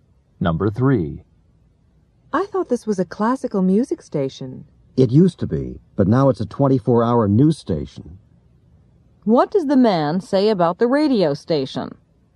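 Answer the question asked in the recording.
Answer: It's no longer a classical music station; it's now a 24-hour news station.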